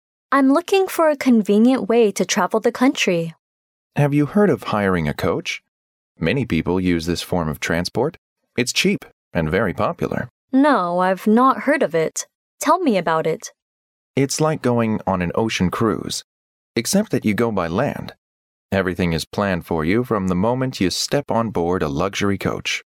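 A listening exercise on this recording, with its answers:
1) Which kind of transport is the man suggesting that the woman takes?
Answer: Coach.

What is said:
W: I'm looking for a convenient way to travel the country.
M: Have you heard of hiring a coach? Many people use this form of transport. It's cheap and very popular.
W: No. I've not heard of it. Tell me about it.
M: It's like going on an ocean cruise except that you go by land. Everything is planned for you from the moment you step on board a luxury coach.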